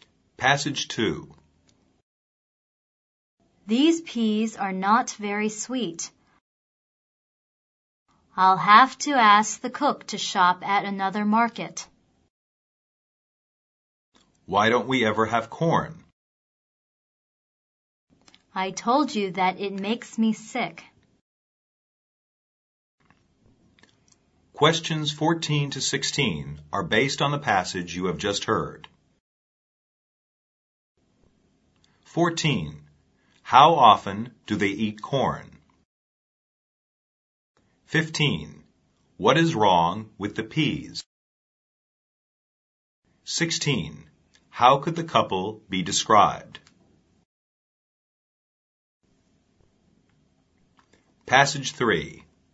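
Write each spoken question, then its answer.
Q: What is wrong with the peas?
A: They are not very sweet.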